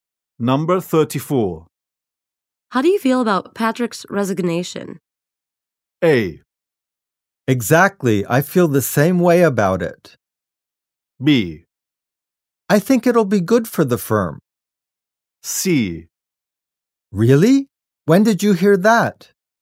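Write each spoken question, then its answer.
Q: How do you feel about Patrick's resignation?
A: B: I think it'll be good for the firm.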